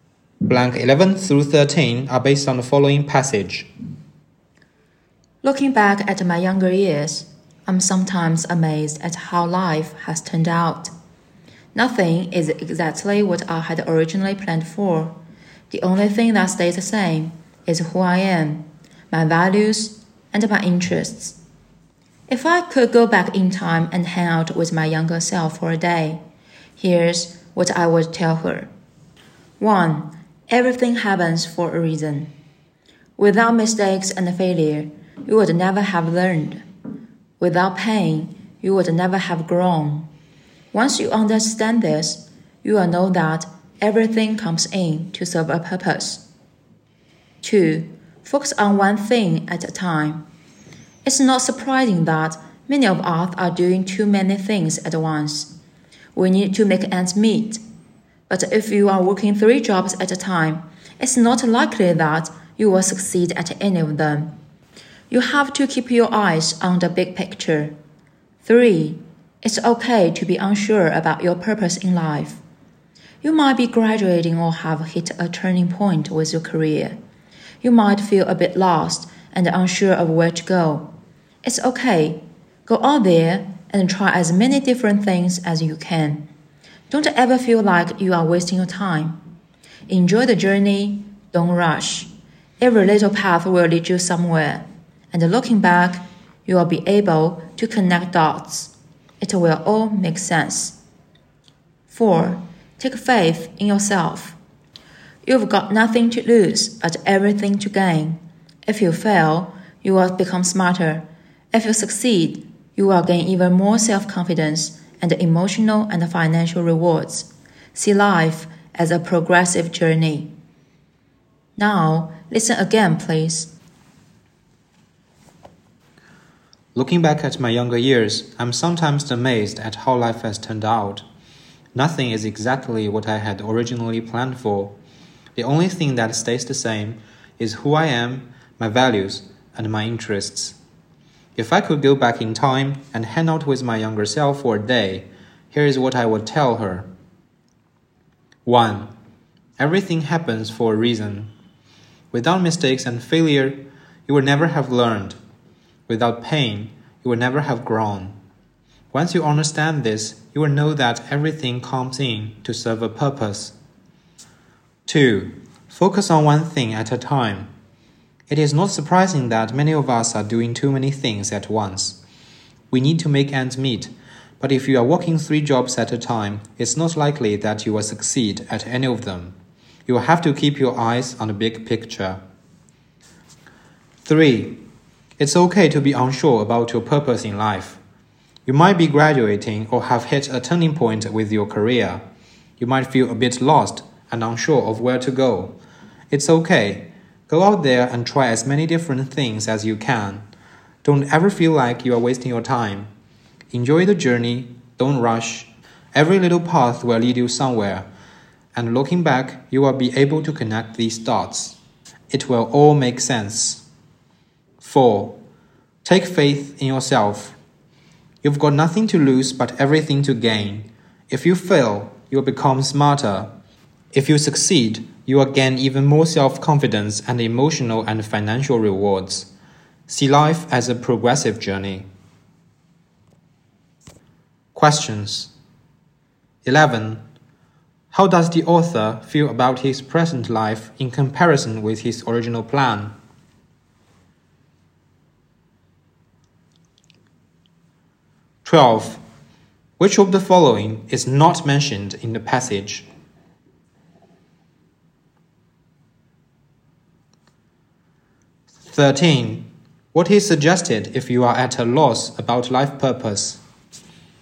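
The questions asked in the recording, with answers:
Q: What is suggested if you are at a loss about life purpose?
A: Try as many different things as you can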